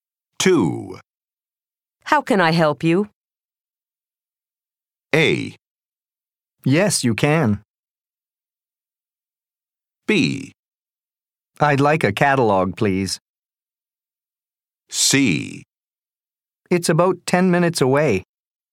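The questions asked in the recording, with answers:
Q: How can I help you?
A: B: I'd like a catalog, please.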